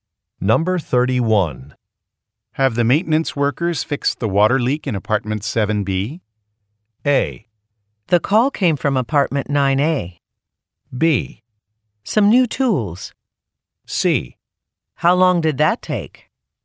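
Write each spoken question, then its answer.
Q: Have the maintenance workers fixed the water leak in apartment 7B?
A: A: The call came from apartment 9A.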